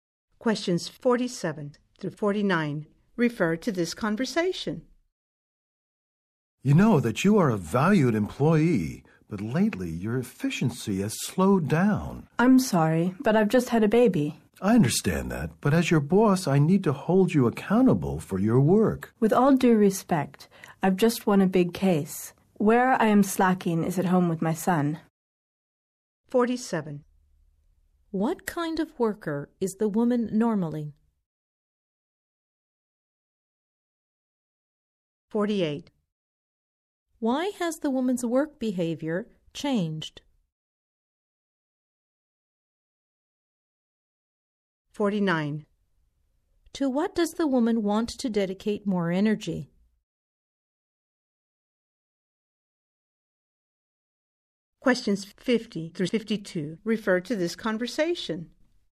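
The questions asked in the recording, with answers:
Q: What kind of worker is the woman normally?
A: A valued, efficient worker

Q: Why has the woman's work behavior changed?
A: She just had a baby

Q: To what does the woman want to dedicate more energy?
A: Her son / home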